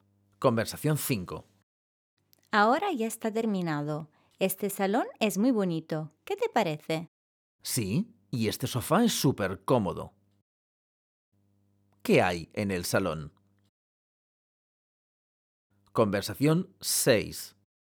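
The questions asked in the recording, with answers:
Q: ¿Qué hay en el salón?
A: Un sofá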